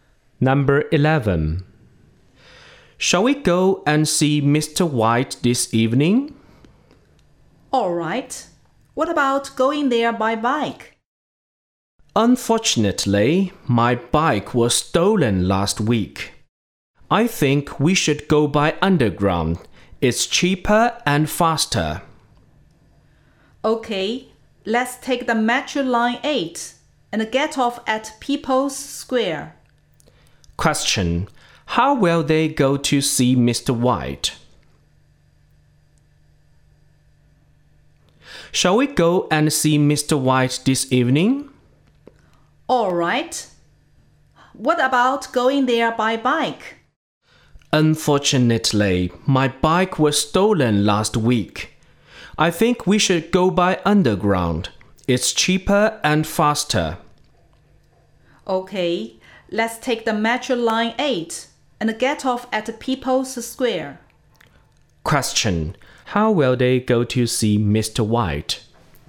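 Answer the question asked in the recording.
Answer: By underground (Metro Line 8)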